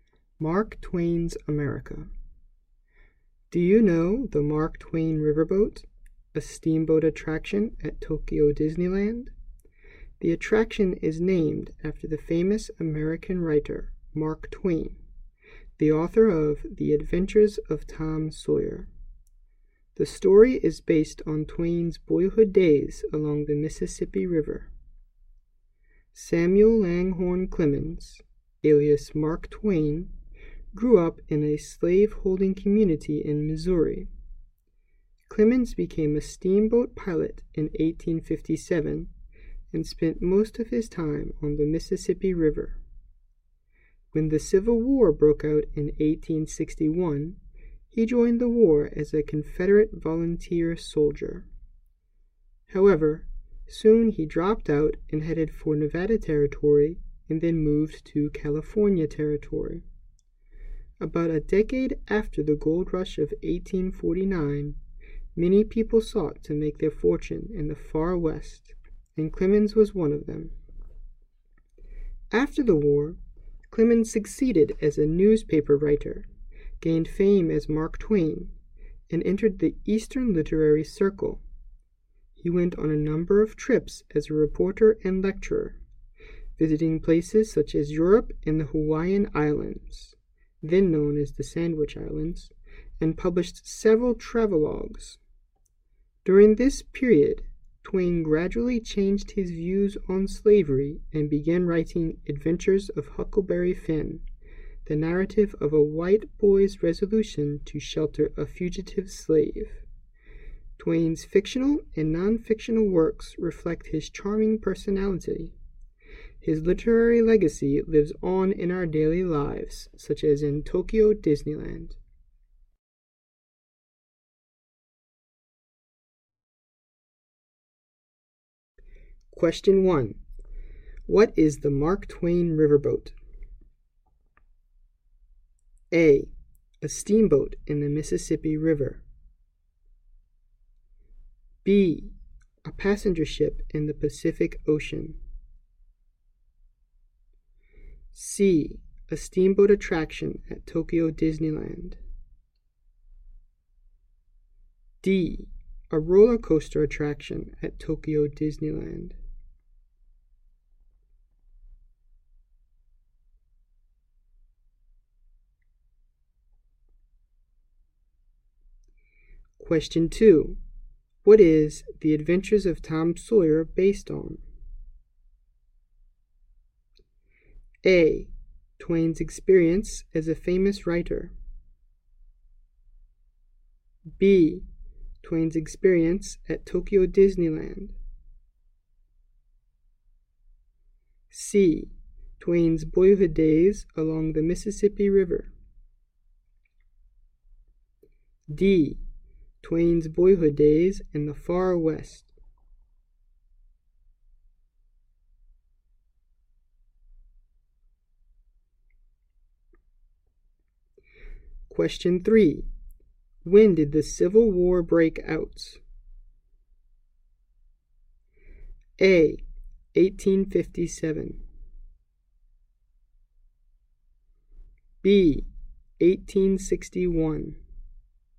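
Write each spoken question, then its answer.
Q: What is the Mark Twain Riverboat?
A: C: A steamboat attraction at Tokyo Disneyland.

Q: What is The Adventures of Tom Sawyer based on?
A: C: Twain's boyhood days along the Mississippi River.

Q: When did the Civil War break out?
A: B: 1861.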